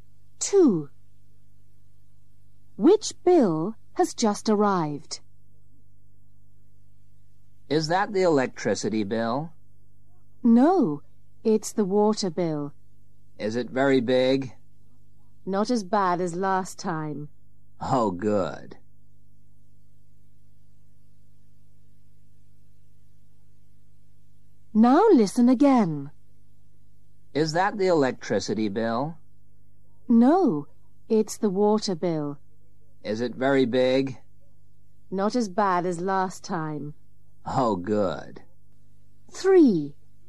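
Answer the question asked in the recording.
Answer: The water bill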